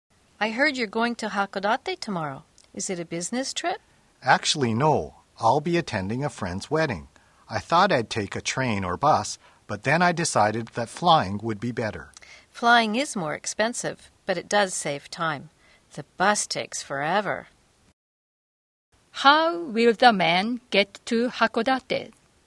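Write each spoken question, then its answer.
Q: How will the man get to Hakodate?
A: By plane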